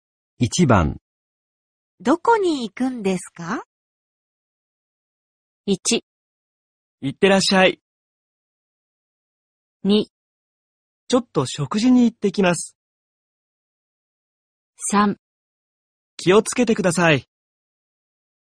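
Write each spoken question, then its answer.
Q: どこに行くんですか?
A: 2: ちょっと食事に行ってきます。

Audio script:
1
いってらっしゃい。
2
ちょっと食事に行ってきます。
3
気をつけてください。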